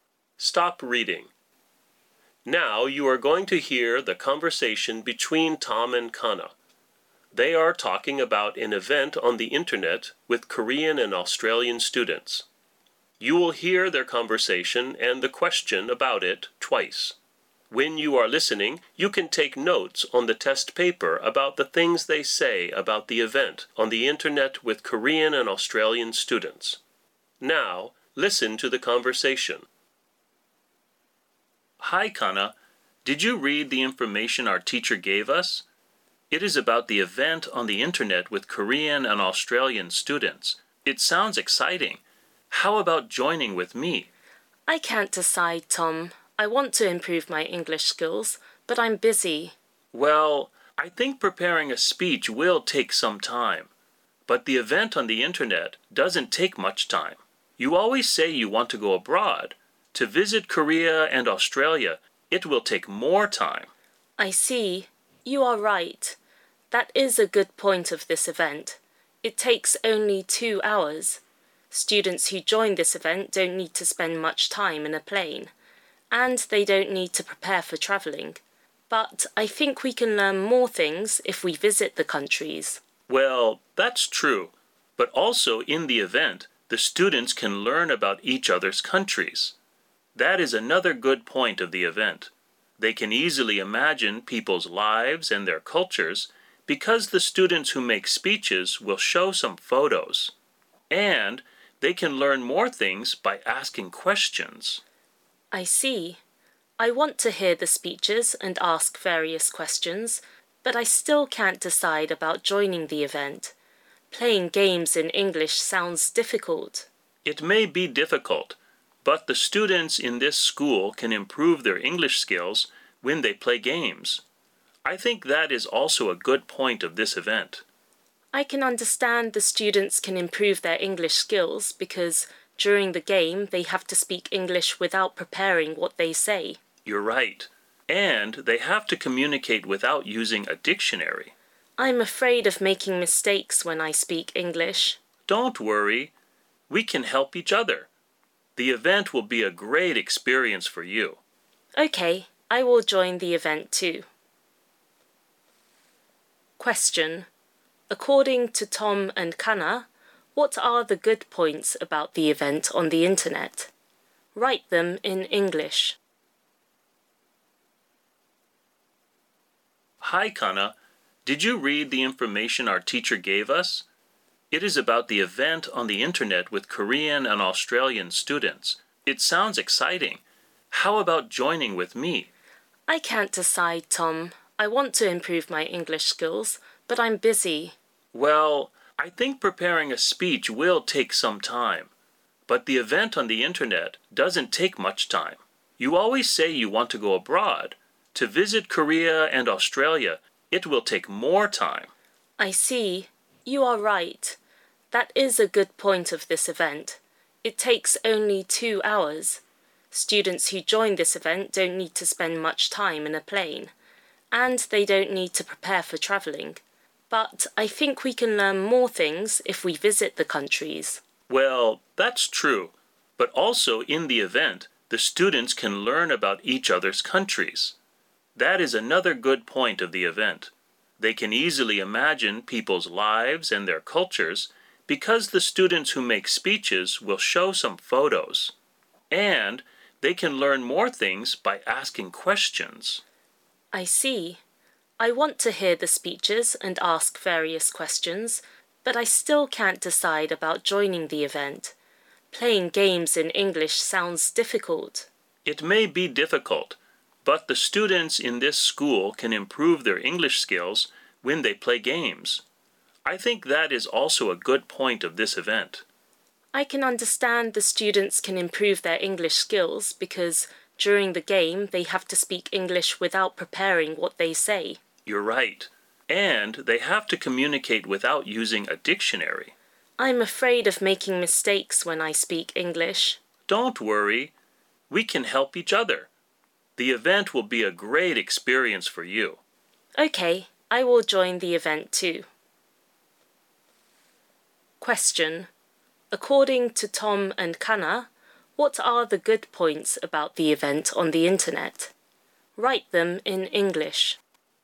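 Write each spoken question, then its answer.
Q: According to Tom and Kana, what are the good points about the event on the internet?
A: It doesn't take much time (only 2 hours, no travel needed); students can learn about each other's countries; students can improve their English skills by playing games.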